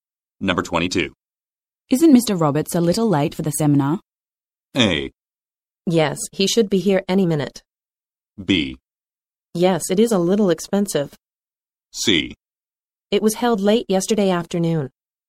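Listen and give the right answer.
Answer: A: Yes, he should be here any minute.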